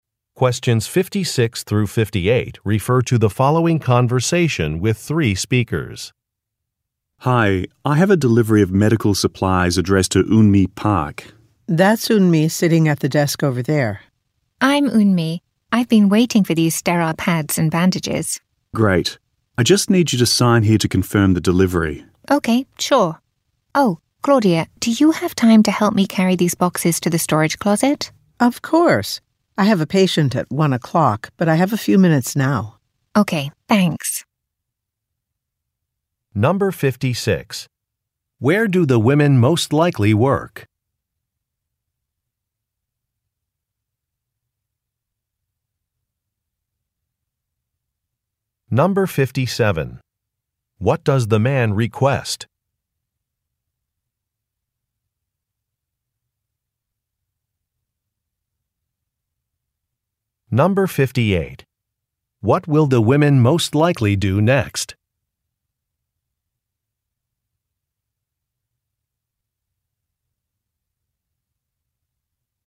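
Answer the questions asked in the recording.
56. At a medical clinic
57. A signature to confirm the delivery
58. Carry the boxes to the storage closet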